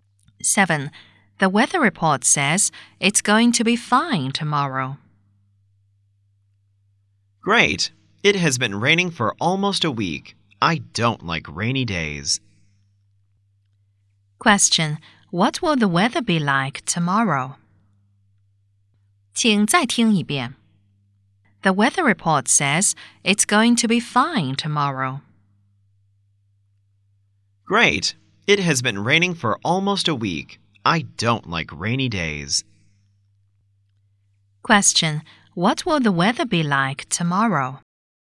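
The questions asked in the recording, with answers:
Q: Question: What will the weather be like tomorrow?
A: Fine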